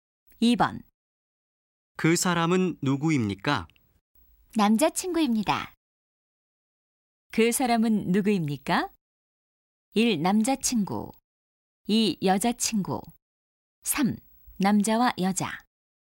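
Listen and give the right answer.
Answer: 1: 남자친구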